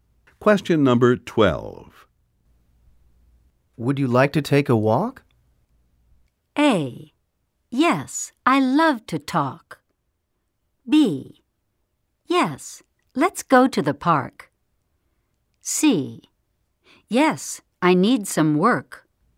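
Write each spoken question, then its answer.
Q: Would you like to take a walk?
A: B: Yes, let's go to the park.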